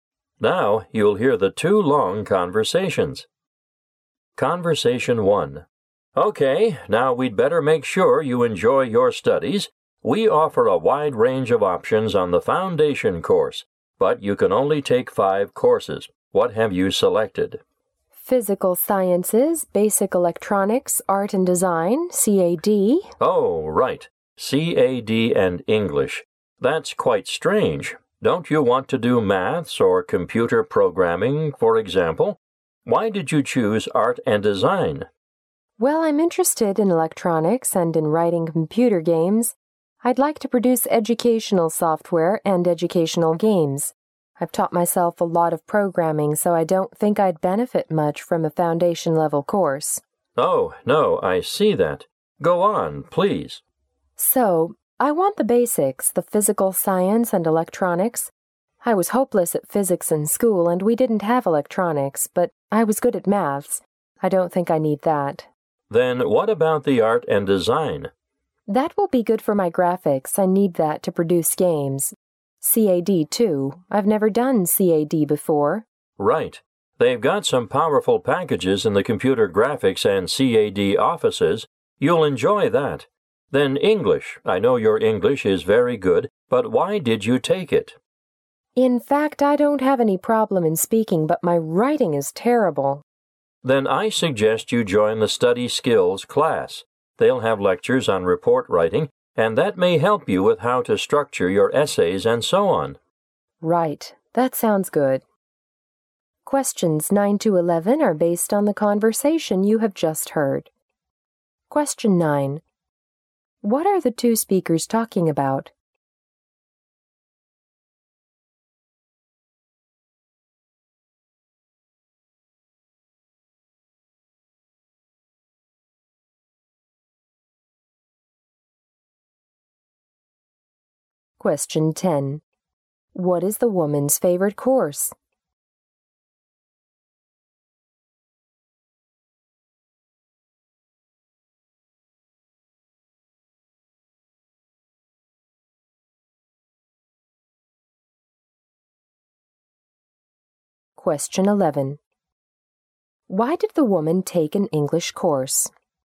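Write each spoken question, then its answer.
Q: What are the two speakers talking about?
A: The woman's choice of courses.

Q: Why did the woman take an English course?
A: To improve her writing.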